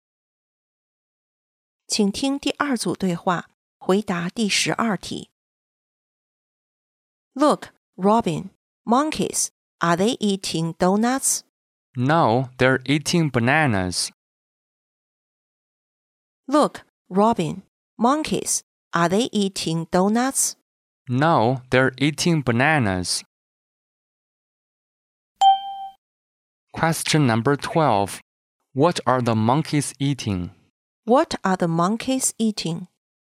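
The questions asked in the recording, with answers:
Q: What are the monkeys eating?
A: Bananas.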